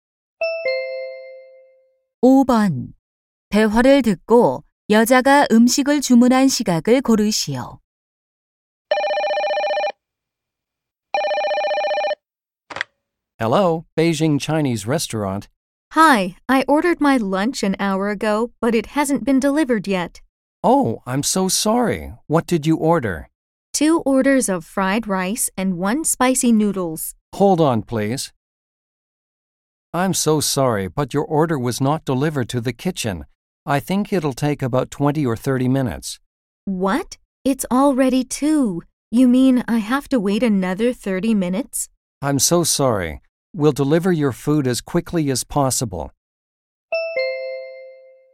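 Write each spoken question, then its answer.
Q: 대화를 듣고 여자가 음식을 주문한 시각을 고르시오.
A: 1시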